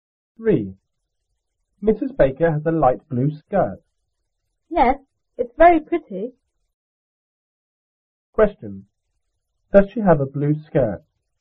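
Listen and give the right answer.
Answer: Yes, a light blue skirt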